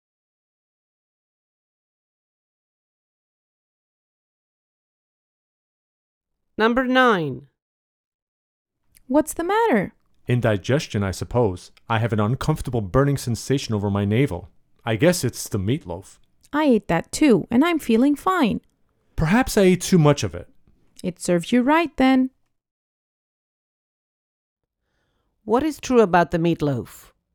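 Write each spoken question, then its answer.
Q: What is true about the meatloaf?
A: It probably wasn't bad; the man likely ate too much of it.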